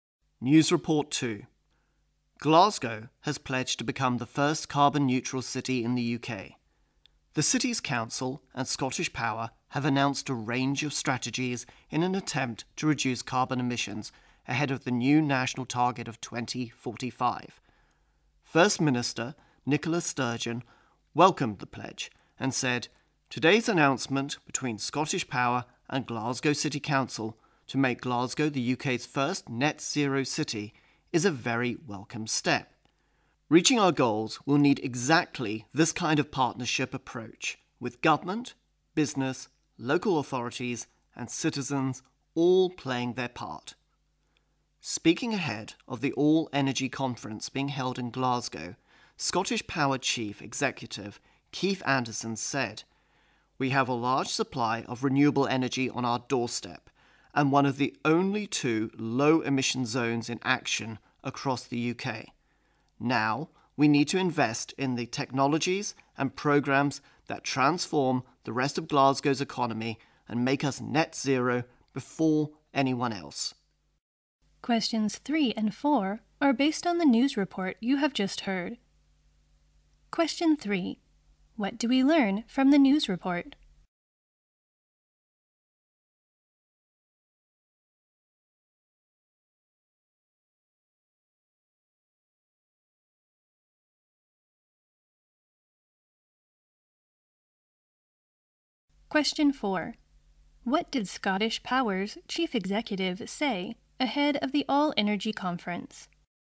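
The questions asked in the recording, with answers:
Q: What do we learn from the news report?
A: Glasgow pledged to become the UK's first carbon-neutral city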